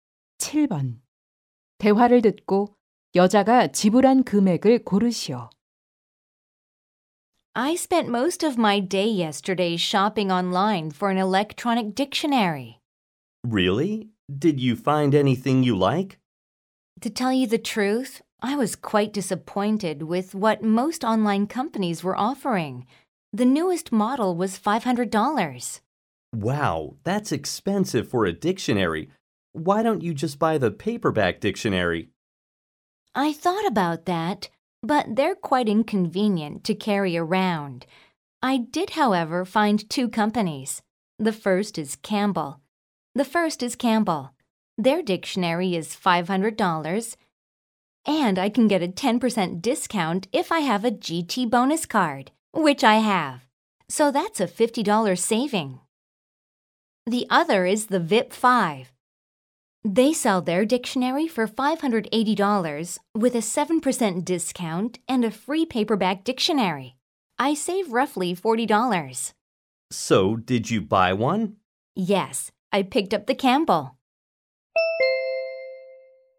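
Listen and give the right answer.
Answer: $450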